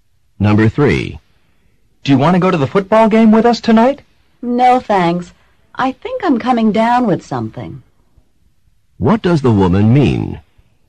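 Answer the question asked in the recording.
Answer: She thinks she is getting sick, so she won't go.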